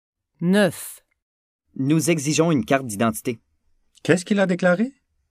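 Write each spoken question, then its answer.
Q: Qu'est-ce qu'il a déclaré?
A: Il a déclaré qu'ils exigeaient une carte d'identité.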